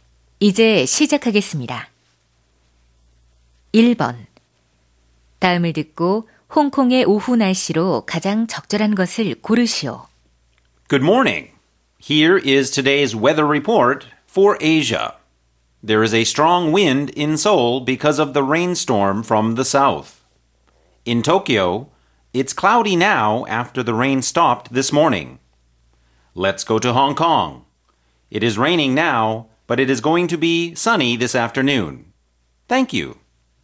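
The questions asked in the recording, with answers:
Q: 다음을 듣고 홍콩의 오후 날씨로 가장 적절한 것을 고르시오.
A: 맑음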